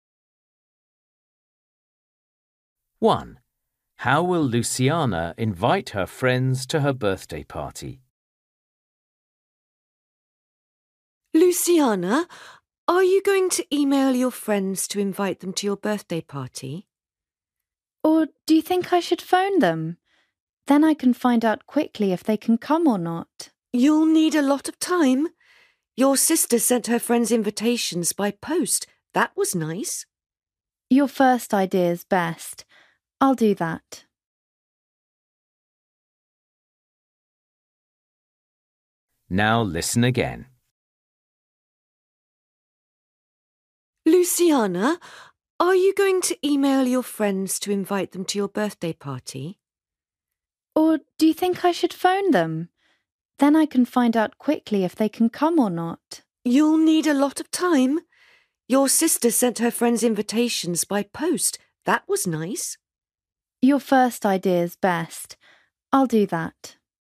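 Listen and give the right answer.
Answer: By email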